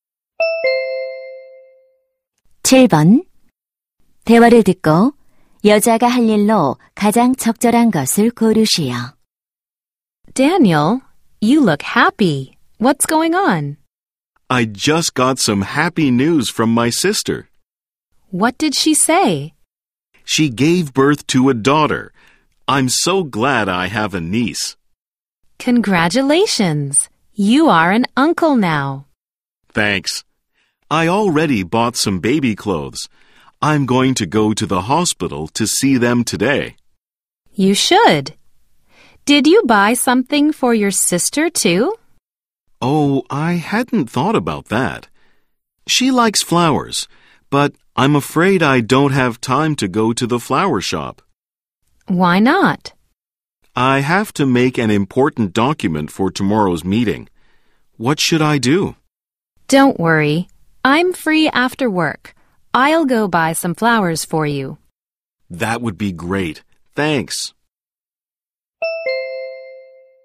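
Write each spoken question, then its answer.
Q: 대화를 듣고 여자가 할 일로 가장 적절한 것을 고르시오.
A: 꽃 사러 가기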